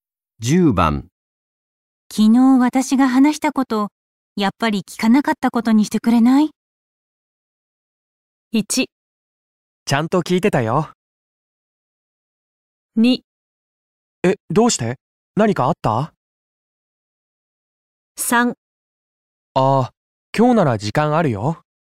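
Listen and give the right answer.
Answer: 2: え、どうして?何かあった?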